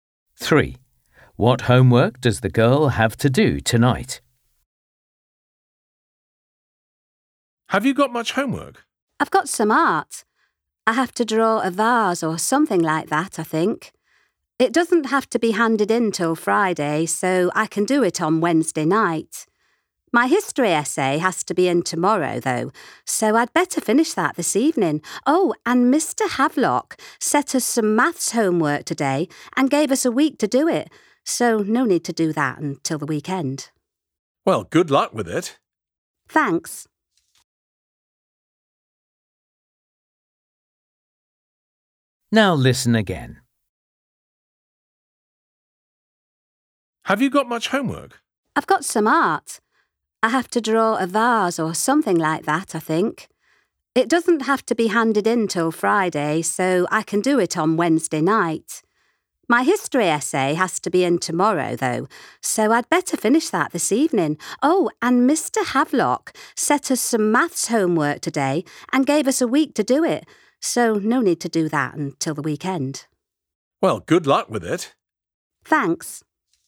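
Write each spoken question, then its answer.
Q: What homework does the girl have to do tonight?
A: history essay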